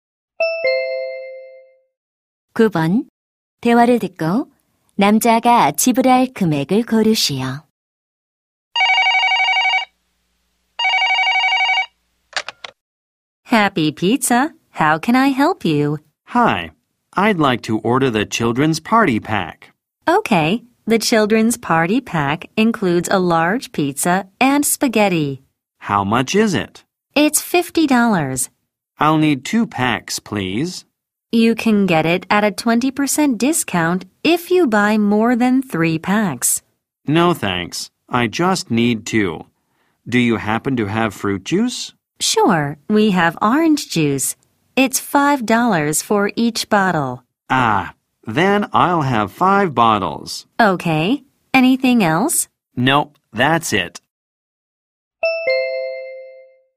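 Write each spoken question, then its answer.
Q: 대화를 듣고 남자가 지불할 금액을 고르시오.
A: 125달러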